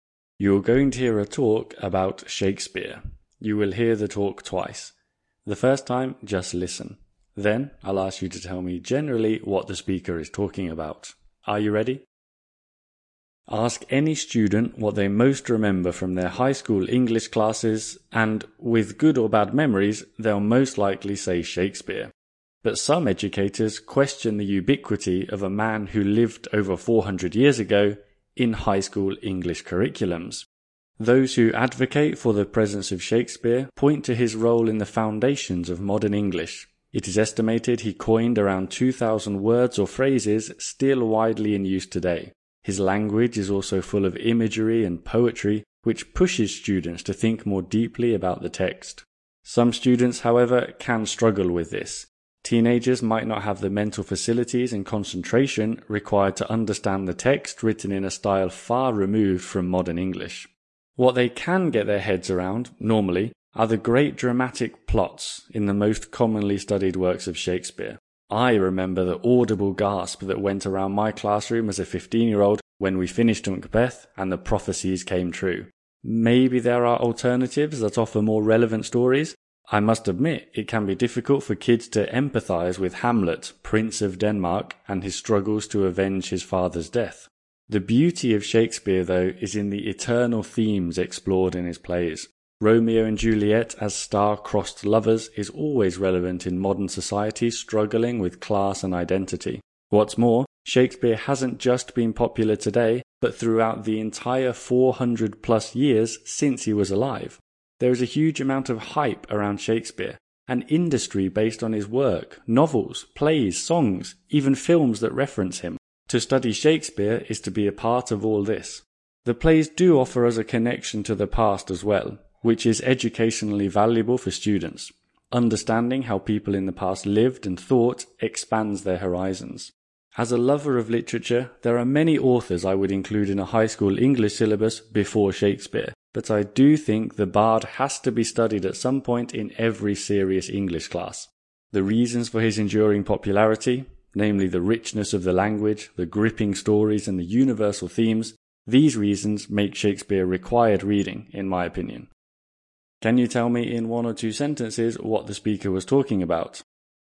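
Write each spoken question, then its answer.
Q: Can you tell me in one or two sentences what the speaker was talking about?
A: Whether Shakespeare should be studied in high school English classes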